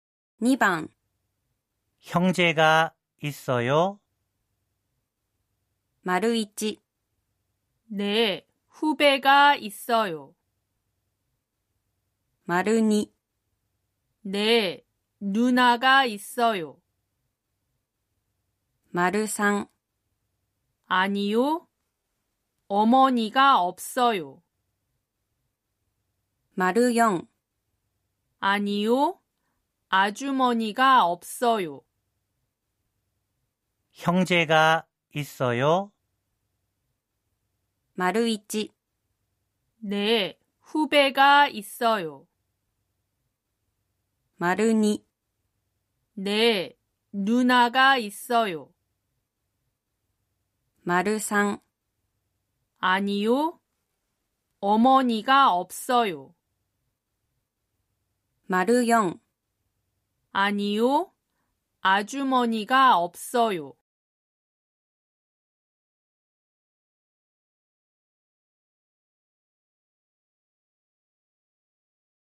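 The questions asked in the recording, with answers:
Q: 형제가있어요?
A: 2: 네, 누나가있어요.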